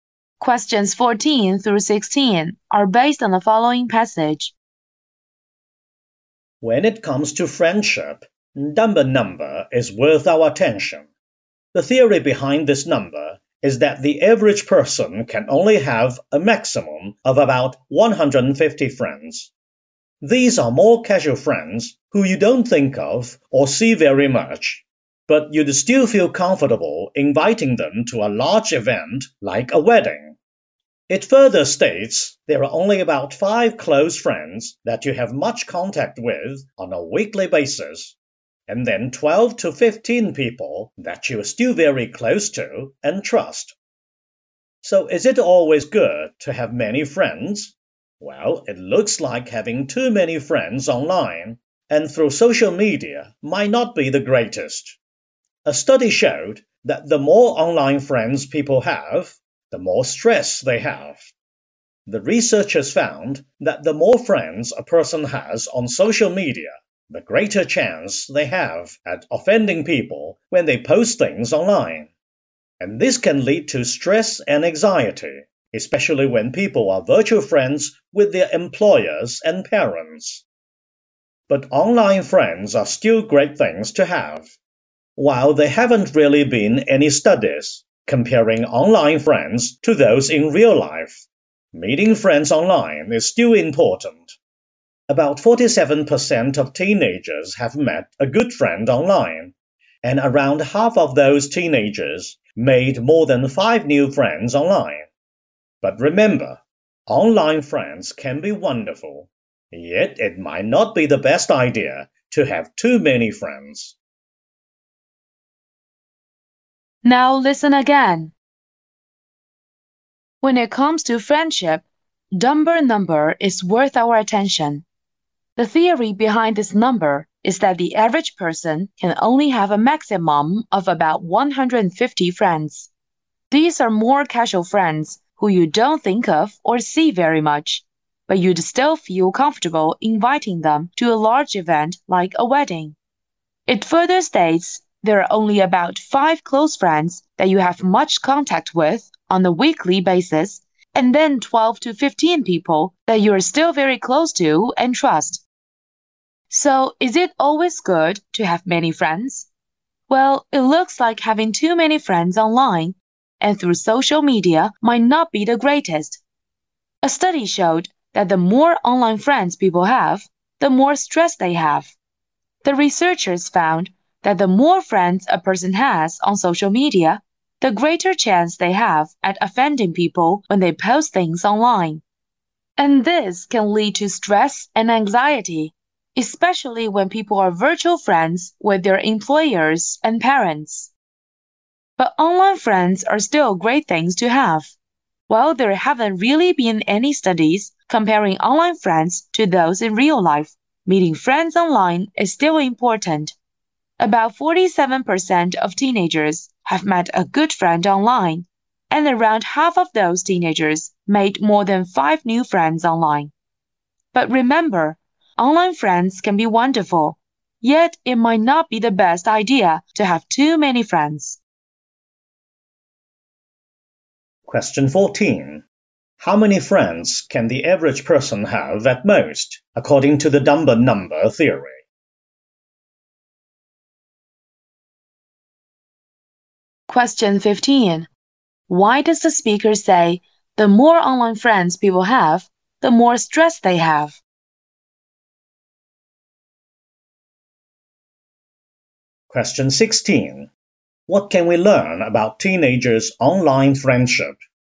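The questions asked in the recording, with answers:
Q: How many friends can the average person have at most, according to the Dunbar number theory?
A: About 150

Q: Why does the speaker say the more online friends people have, the more stress they have?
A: They are more likely to offend people when they post online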